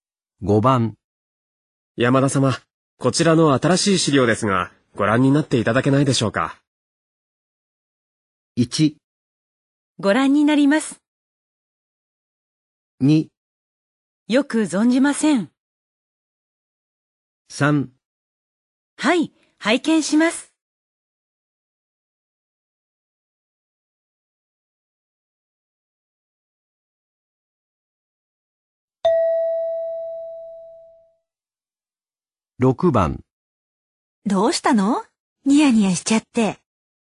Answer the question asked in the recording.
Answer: 3

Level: N2 Listening · Test 12